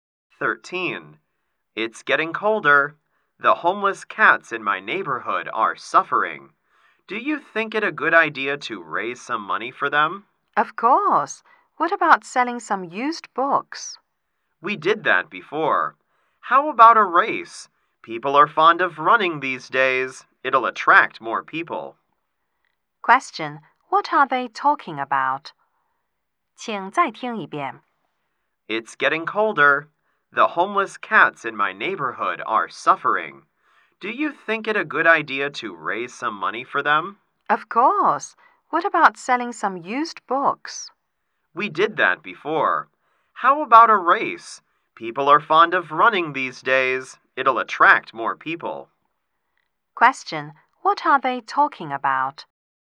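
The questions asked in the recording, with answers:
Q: Question. What are they talking about?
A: How to raise money for homeless cats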